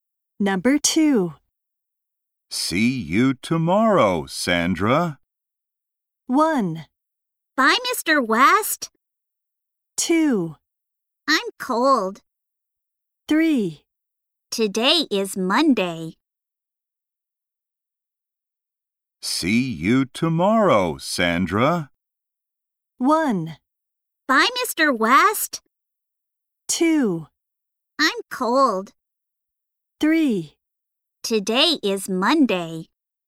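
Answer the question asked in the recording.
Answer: 1: Bye, Mr. West.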